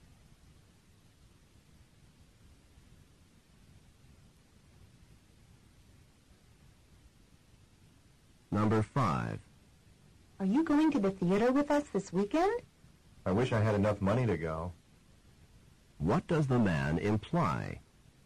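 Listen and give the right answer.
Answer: He does not have enough money to go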